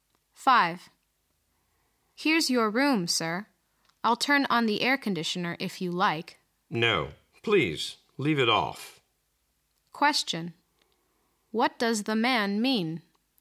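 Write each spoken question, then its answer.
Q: What does the man mean?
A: He doesn't want the air conditioner turned on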